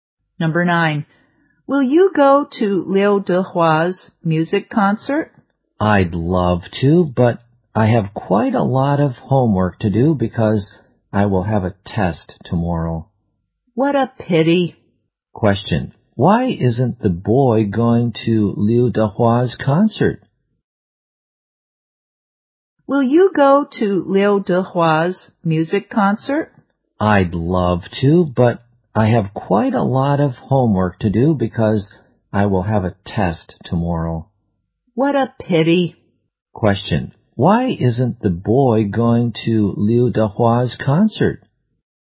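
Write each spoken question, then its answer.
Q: why isn't the boy going to Liu Dehua's concert?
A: He has a lot of homework because of a test tomorrow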